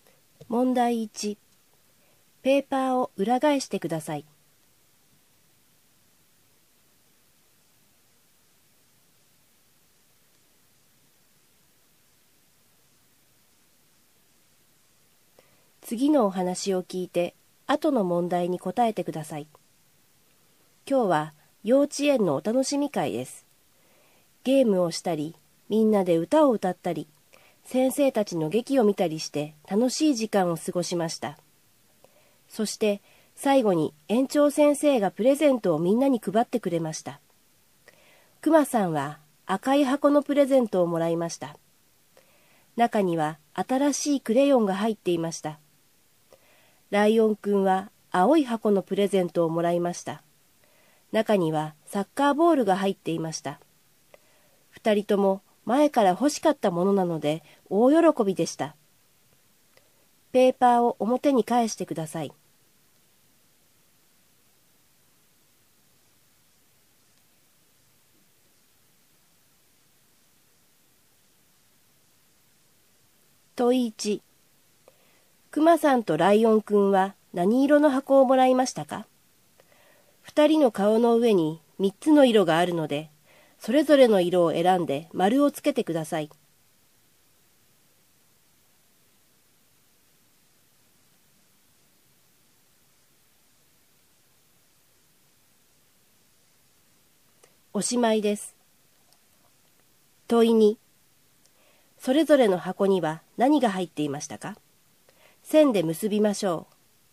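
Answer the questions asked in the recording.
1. クマさんは赤、ライオンくんは青
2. クマさんの赤い箱にはクレヨン、ライオンくんの青い箱にはサッカーボール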